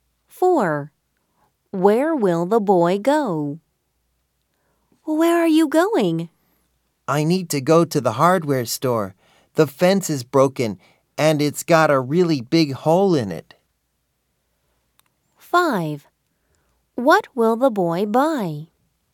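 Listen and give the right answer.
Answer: To the hardware store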